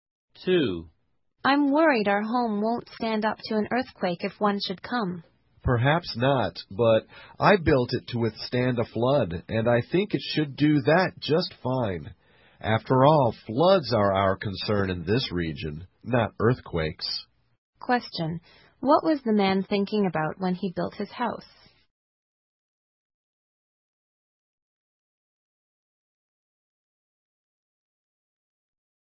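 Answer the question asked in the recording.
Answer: Making it withstand a flood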